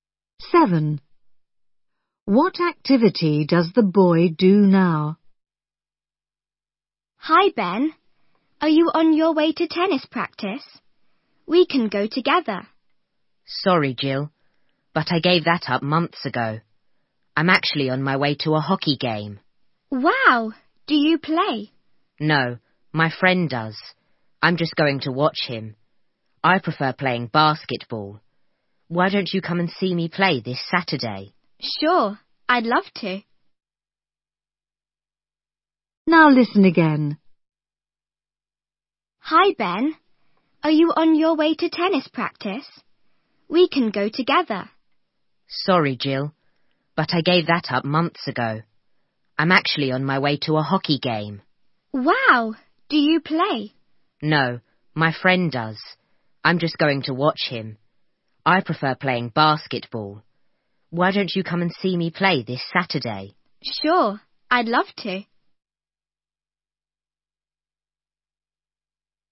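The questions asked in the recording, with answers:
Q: What activity does the boy do now?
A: Basketball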